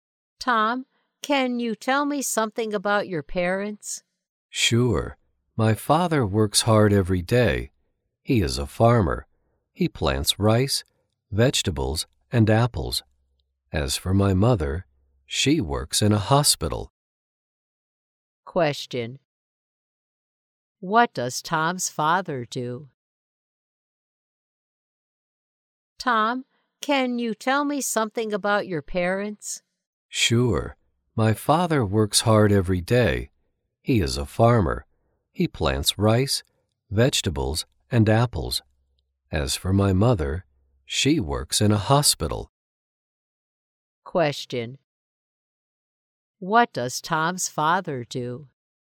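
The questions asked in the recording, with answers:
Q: What does Tom's father do?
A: He is a farmer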